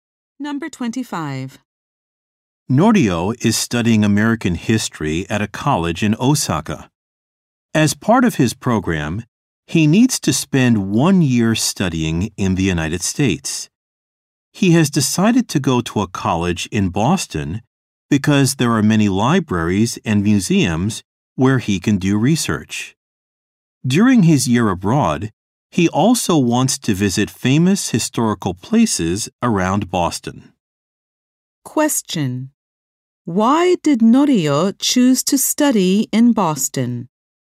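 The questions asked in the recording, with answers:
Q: Question: Why did Norio choose to study in Boston?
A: It has many libraries and museums for research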